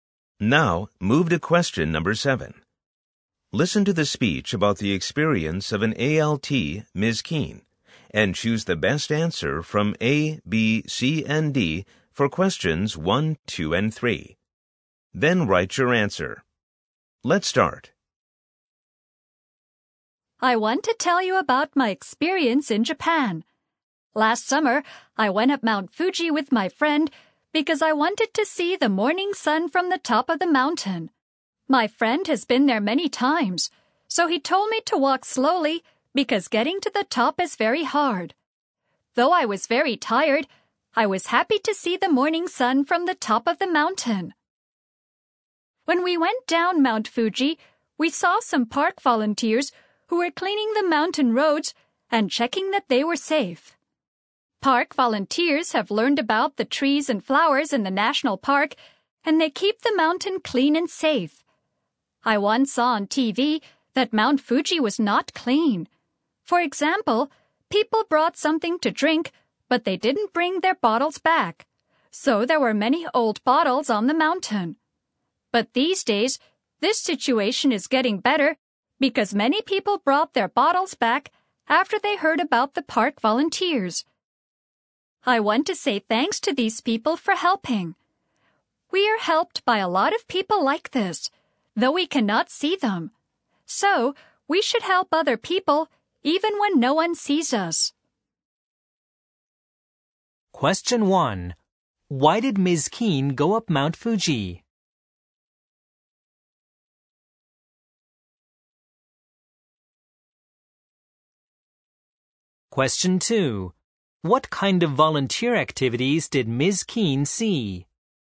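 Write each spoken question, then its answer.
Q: Why did Ms. Keene go up Mount Fuji?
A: Because she wanted to see the morning sun from the top of the mountain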